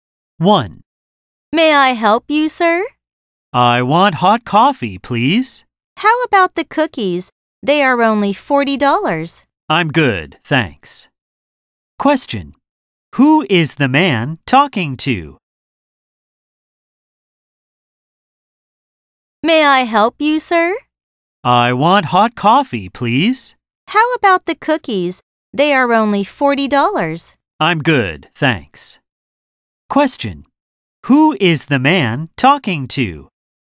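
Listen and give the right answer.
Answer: A clerk (salesperson at a coffee shop)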